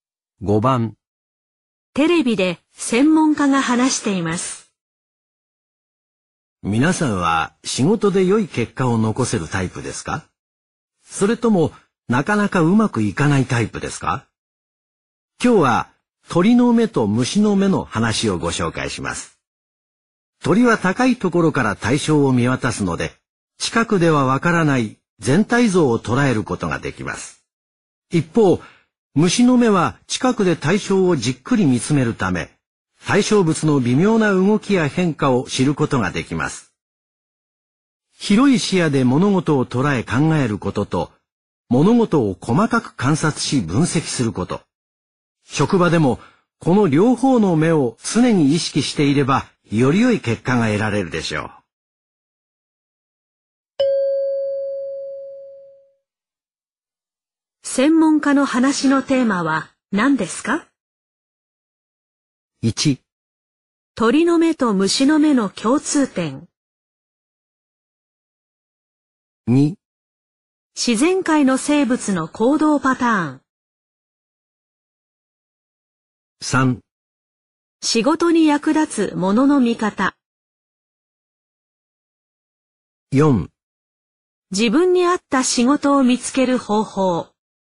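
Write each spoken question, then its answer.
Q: 専門家の話のテーマは何ですか?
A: 3: 仕事に役立つものの見方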